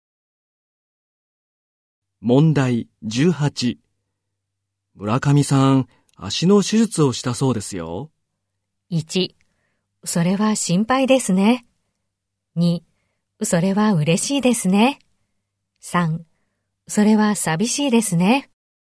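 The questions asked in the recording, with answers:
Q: 村上さん、足の手術をしたそうですよ。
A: 1: それは心配ですね。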